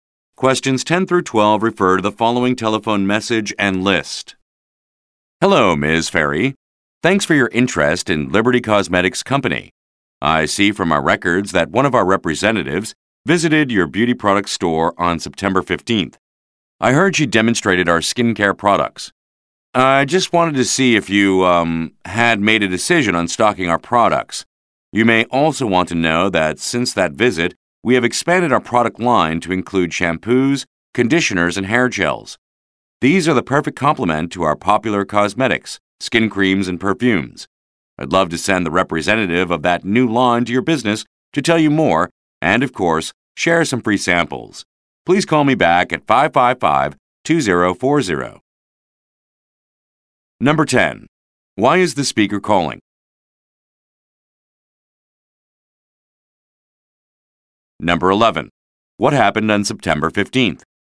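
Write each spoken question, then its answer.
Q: Why is the speaker calling?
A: To find out whether Ms. Ferry has decided to stock Liberty Cosmetics products

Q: What happened on September 15th?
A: A company representative visited her store and demonstrated skincare products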